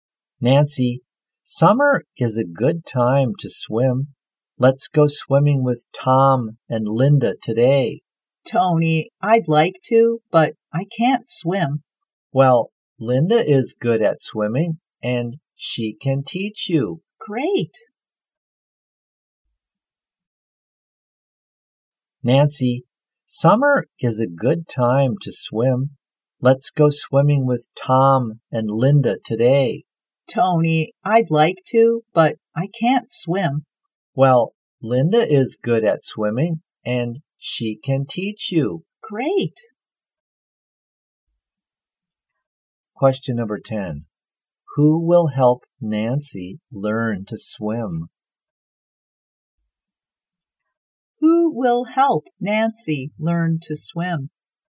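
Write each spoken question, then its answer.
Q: Who will help Nancy learn to swim?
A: Linda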